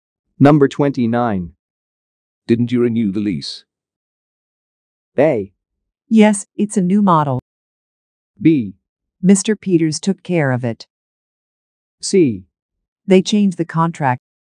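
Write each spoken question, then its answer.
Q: Didn't you renew the lease?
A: B: Mr. Peters took care of it.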